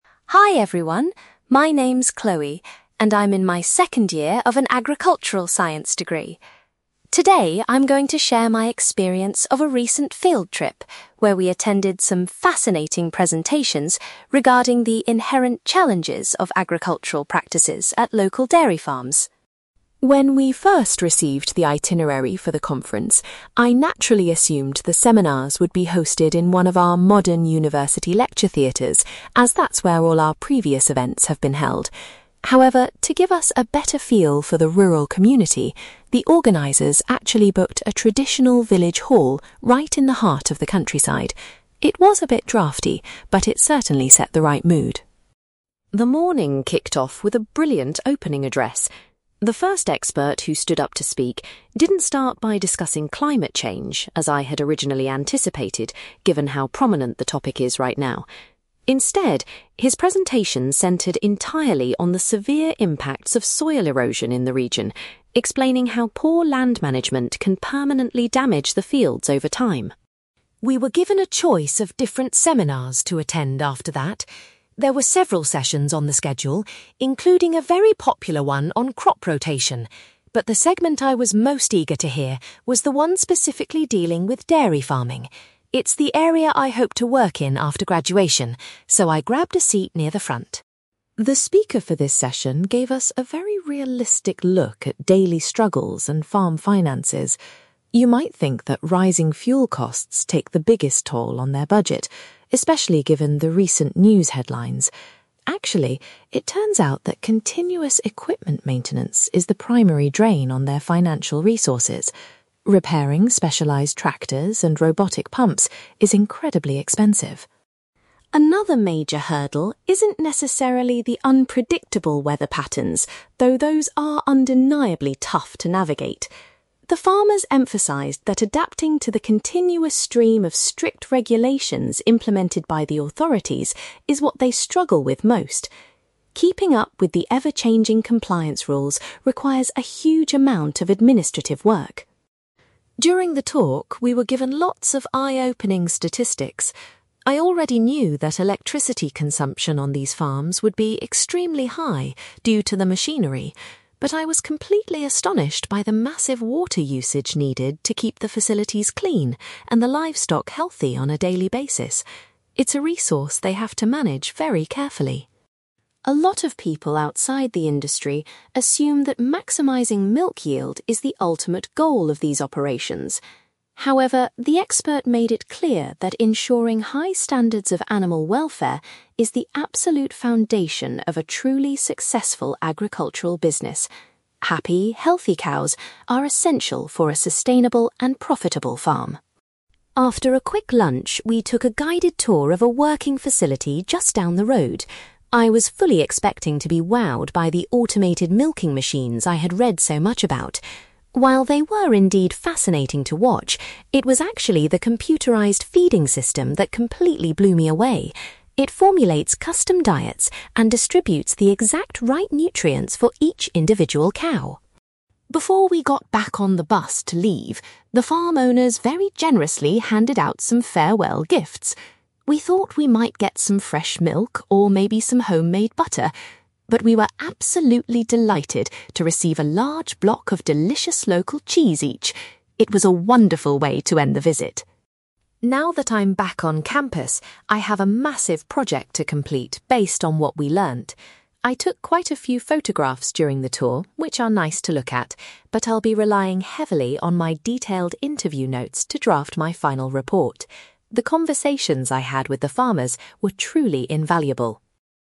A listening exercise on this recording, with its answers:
You will hear an agricultural science student called Chloe giving a presentation about a recent field trip to a farming conference. For questions 9-18, complete the sentences with a word or short phrase.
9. Chloe expected the event to be held at a university, but it actually took place in a (9)........................... .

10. The opening talk focused on the problems caused by (10)........................... rather than climate change.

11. Chloe was particularly looking forward to the presentation about (11)........................... .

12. The speaker explained that dealing with (12)........................... is currently the biggest financial challenge for farmers.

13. Farmers are finding it increasingly difficult to keep up with (13)........................... introduced by the government.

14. Chloe was surprised to learn how much (14)........................... is required on a modern farm.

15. According to the presentation, the most important factor for success is prioritizing (15)........................... above all else.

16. During the afternoon farm visit, Chloe found the (16)........................... to be the most impressive technology.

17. At the end of the day, the students were given some (17)........................... to take home.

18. Chloe plans to use her (18)........................... to write her final assignment.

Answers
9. village hall
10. soil erosion
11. dairy farming
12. equipment maintenance
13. strict regulations
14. water usage
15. animal welfare
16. feeding system
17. local cheese
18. interview notes

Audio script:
Chloe: Hi everyone, my name is Chloe, and I'm in my second year of an agricultural science degree. Today, I'm going to share my experience of a recent field trip where we attended some fascinating presentations regarding the inherent challenges of agricultural practices at local dairy farms.
When we first received the itinerary for the conference, I naturally assumed the seminars would be hosted in one of our modern university lecture theatres, as that's where all our previous events have been held. However, to give us a better feel for the rural community, the organisers actually booked a traditional village hall right in the heart of the countryside. It was a bit drafty, but it certainly set the right mood!
The morning kicked off with a brilliant opening address. The first expert who stood up to speak didn't start by discussing climate change, as I had originally anticipated given how prominent the topic is right now. Instead, his presentation centered entirely on the severe impacts of soil erosion in the region, explaining how poor land management can permanently damage the fields over time.
We were given a choice of different seminars to attend after that. There were several sessions on the schedule, including a very popular one on crop rotation, but the segment I was most eager to hear was the one specifically dealing with dairy farming. It's the area I hope to work in after graduation, so I grabbed a seat near the front.
The speaker for this session gave us a very realistic look at daily struggles and farm finances. You might think that rising fuel costs take the biggest toll on their budget, especially given the recent news headlines. Actually, it turns out that continuous equipment maintenance is the primary drain on their financial resources. Repairing specialized tractors and robotic pumps is incredibly expensive.
Another major hurdle isn't necessarily the unpredictable weather patterns, though those are undeniably tough to navigate. The farmers emphasized that adapting to the continuous stream of strict regulations implemented by the authorities is what they struggle with most. Keeping up with the ever-changing compliance rules requires a huge amount of administrative work.
During the talk, we were given lots of eye-opening statistics. I already knew that electricity consumption on these farms would be extremely high due to the machinery, but I was completely astonished by the massive water usage needed to keep the facilities clean and the livestock healthy on a daily basis. It's a resource they have to manage very carefully.
A lot of people outside the industry assume that maximizing milk yield is the ultimate goal of these operations. However, the expert made it clear that ensuring high standards of animal welfare is the absolute foundation of a truly successful agricultural business. Happy, healthy cows are essential for a sustainable and profitable farm.
After a quick lunch, we took a guided tour of a working facility just down the road. I was fully expecting to be wowed by the automated milking machines I had read so much about. While they were indeed fascinating to watch, it was actually the computerised feeding system that completely blew me away. It formulates custom diets and distributes the exact right nutrients for each individual cow!
Before we got back on the bus to leave, the farm owners very generously handed out some farewell gifts. We thought we might get some fresh milk or maybe some homemade butter, but we were absolutely delighted to receive a large block of delicious local cheese each. It was a wonderful way to end the visit.
Now that I'm back on campus, I have a massive project to complete based on what we learned. I took quite a few photographs during the tour, which are nice to look at, but I'll be relying heavily on my detailed interview notes to draft my final report. The conversations I had with the farmers were truly invaluable.

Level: B2